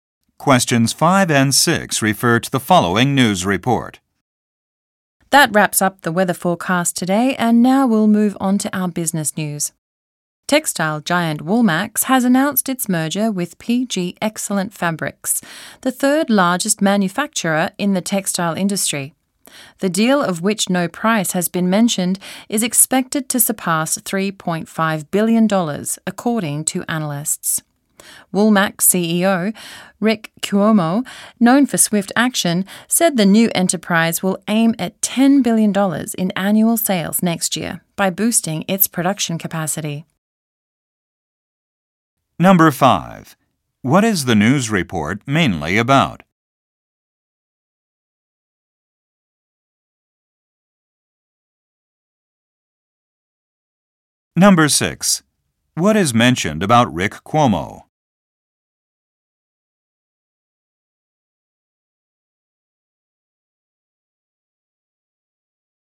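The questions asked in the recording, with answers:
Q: What is the news report mainly about?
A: The merger of Woolmax and PG Excellent Fabrics

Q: What is mentioned about Rick Cuomo?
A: He is known for swift action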